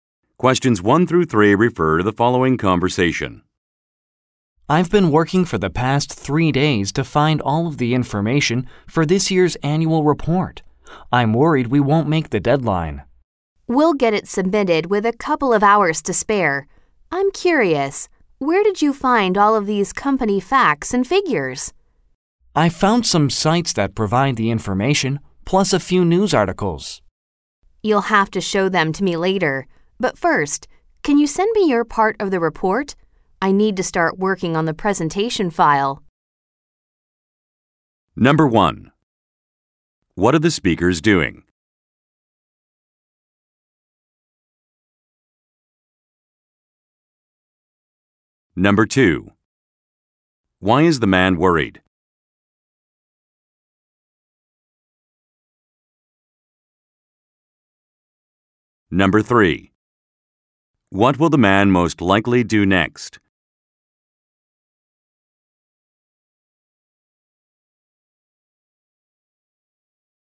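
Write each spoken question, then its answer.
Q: What are the speakers doing?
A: Preparing this year's annual report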